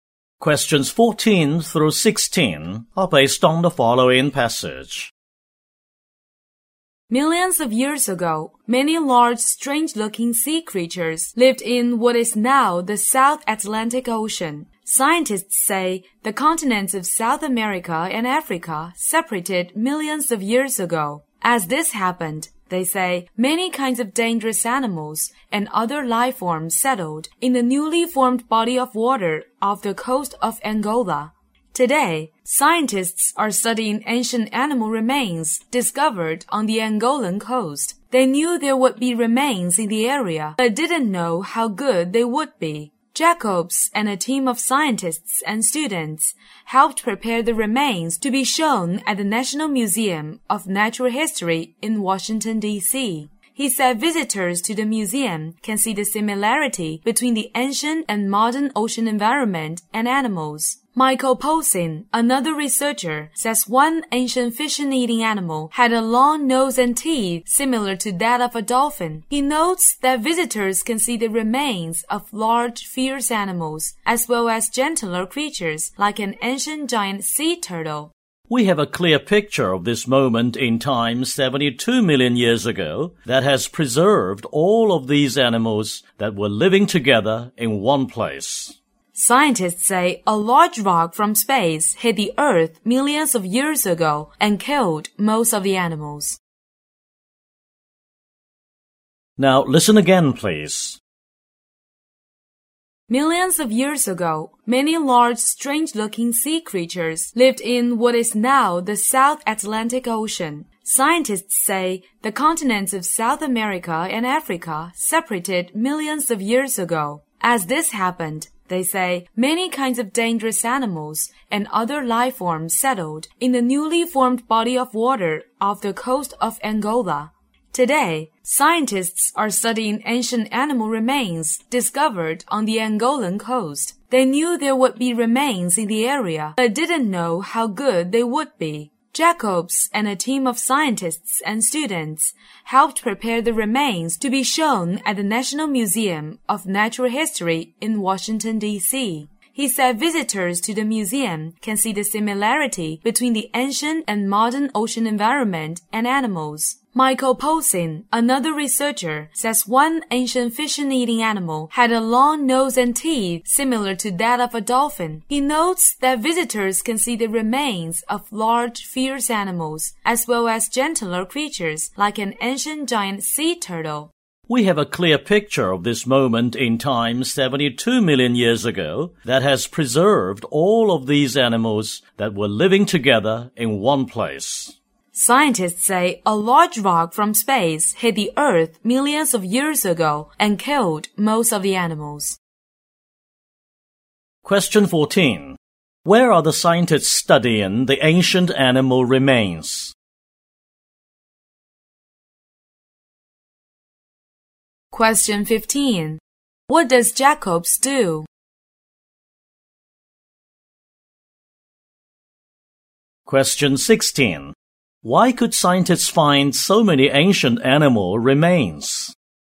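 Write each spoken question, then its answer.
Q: Where are the scientists studying the ancient animal remains?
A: On the Angolan coast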